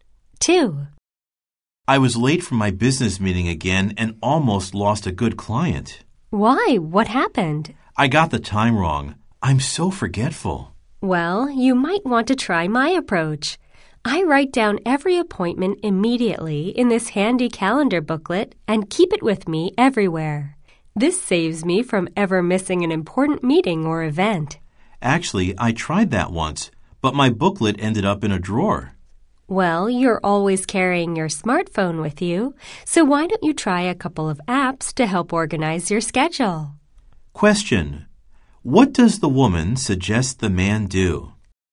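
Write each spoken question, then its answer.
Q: What does the woman suggest the man do?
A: Try smartphone apps to organize his schedule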